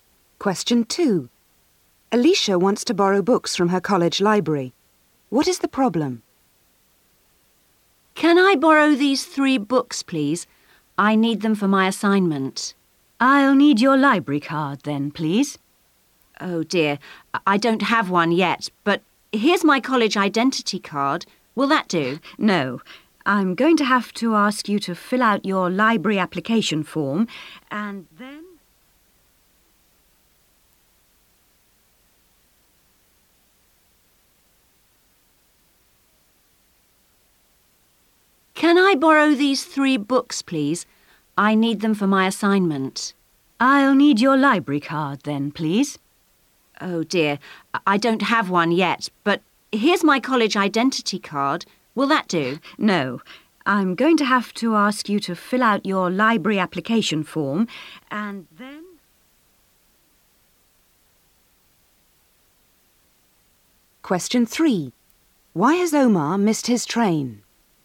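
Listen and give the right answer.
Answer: She doesn't have a library card yet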